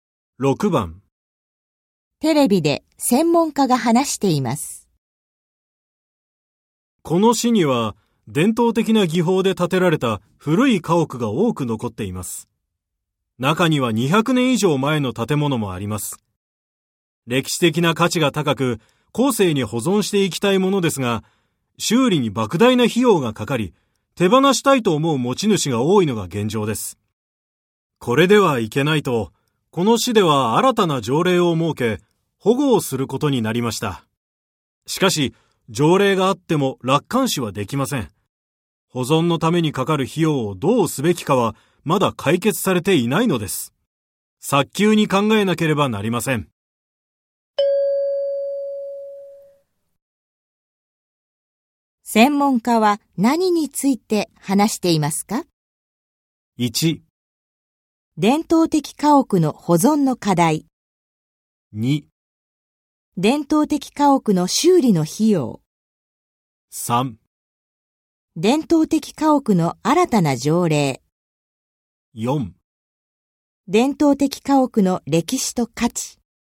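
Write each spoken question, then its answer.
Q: 専門家は何について話していますか?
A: 1: 伝統的家屋の保存の課題。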